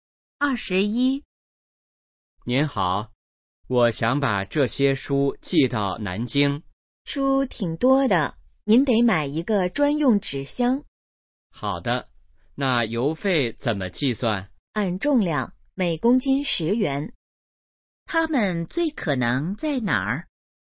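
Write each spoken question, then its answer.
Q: 他们最可能在哪儿?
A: 邮局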